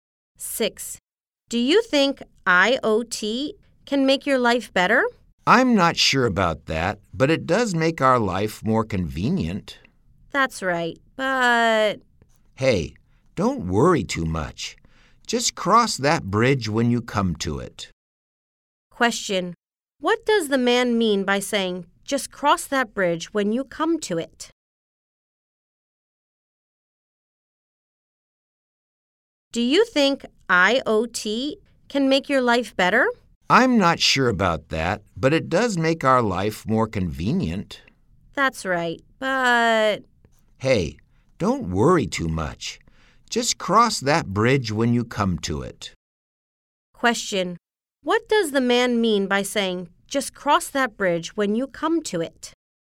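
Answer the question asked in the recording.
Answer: Don't worry about a problem until it actually happens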